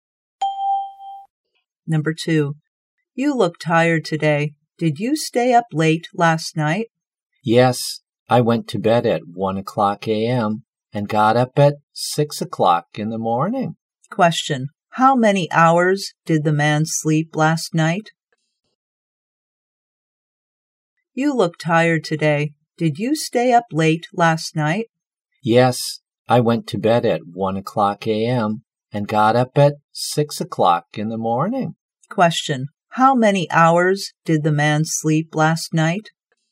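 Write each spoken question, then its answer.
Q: How many hours did the man sleep last night?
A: Five hours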